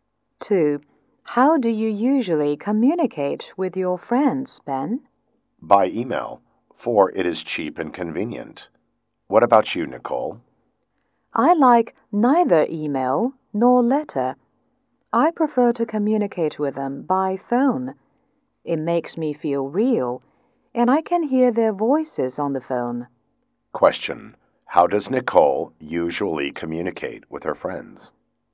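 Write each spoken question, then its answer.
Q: How does Nicole usually communicate with her friends?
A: By phone.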